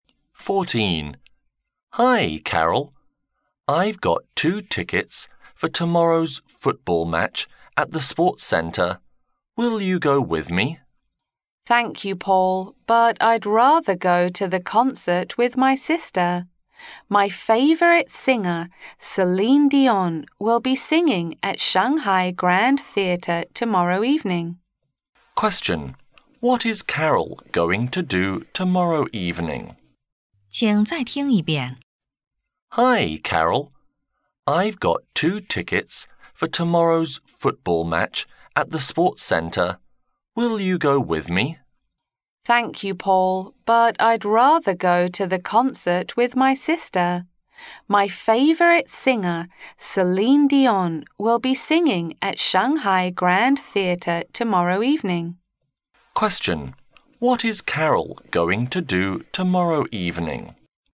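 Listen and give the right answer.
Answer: Go to a concert with her sister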